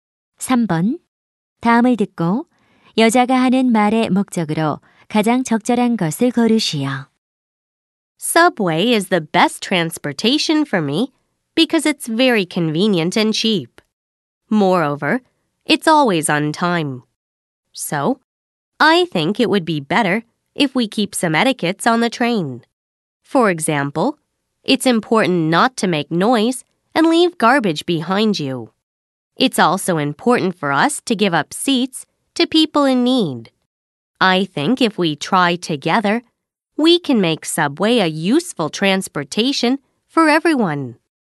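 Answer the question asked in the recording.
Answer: 지하철 예절을 지키자고 당부하려고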